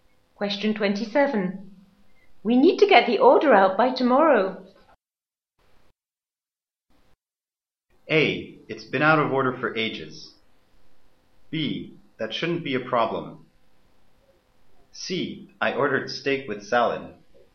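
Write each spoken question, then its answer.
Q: We need to get the order out by tomorrow.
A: B: That shouldn't be a problem.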